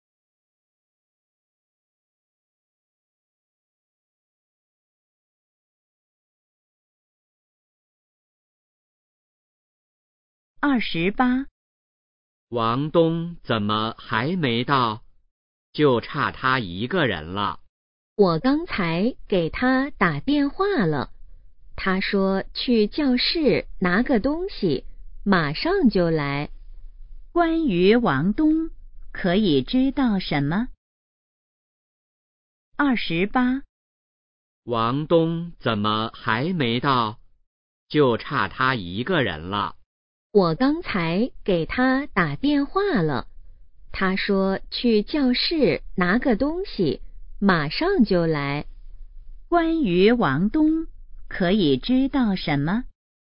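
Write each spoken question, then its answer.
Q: 关于王东,可以知道什么?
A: 他去教室拿东西了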